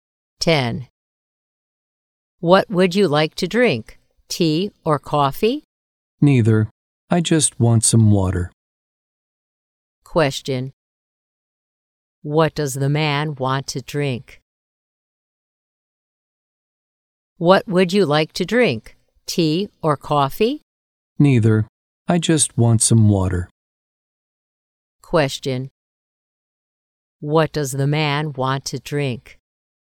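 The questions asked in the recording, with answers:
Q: What does the man want to drink?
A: Water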